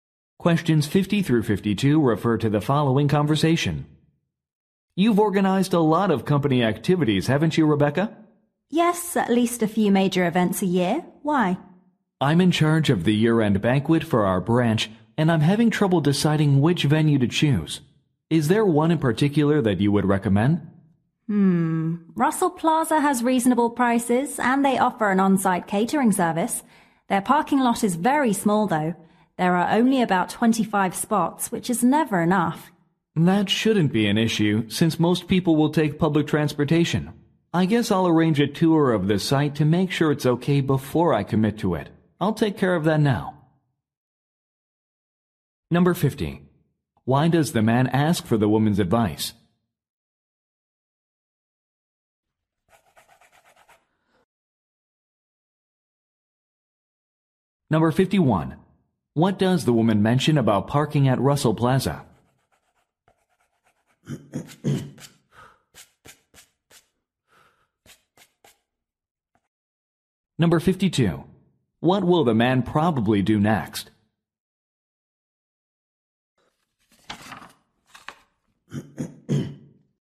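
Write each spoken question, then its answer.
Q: Why does the man ask for the woman's advice?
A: She has organized many company events

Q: What does the woman mention about parking at Russell Plaza?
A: The lot is too small

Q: What will the man probably do next?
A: Arrange a tour of the venue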